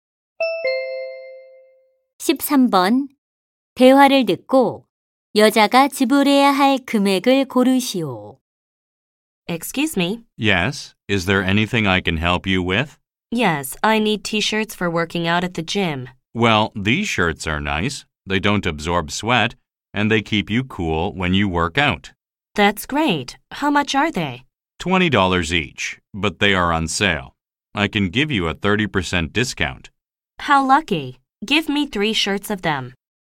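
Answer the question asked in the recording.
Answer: $42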